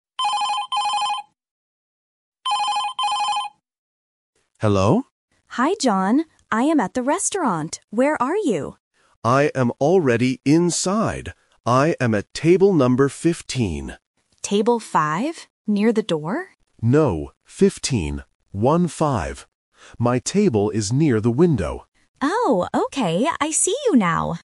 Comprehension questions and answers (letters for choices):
Listen to the phone conversation between two friends and choose the correct answer (A, B, or C).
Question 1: Where is John?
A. Inside the restaurant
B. At the door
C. At home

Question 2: What is John's table number?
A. 5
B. 15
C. 50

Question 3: Where is John's table?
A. Near the kitchen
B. Near the door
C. Near the window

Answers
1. A
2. B
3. C

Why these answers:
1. John clearly says, "I am already inside." Why the trap is wrong: Option B (At the door) is a trap because Emma mentions the door later, but John is not there. Option C (At home) is plausible for a phone call context but is not mentioned.
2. John says he is at table 15 and spells out the numbers: "One-five." Why the trap is wrong: Option A (5) is a trap. Emma mishears and asks "Table 5?", but John corrects her. Option C (50) is a phonetic distractor but not mentioned.
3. John says, "My table is near the window." Why the trap is wrong: Option B (Near the door) is a trap. Emma guesses the table is near the door, but John says no. Option A (Near the kitchen) is a plausible location in a restaurant but is not mentioned in the audio.

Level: A1